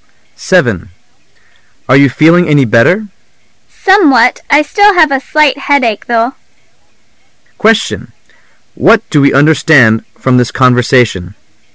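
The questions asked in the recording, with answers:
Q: What do we understand from this conversation?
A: The woman feels somewhat better but still has a slight headache.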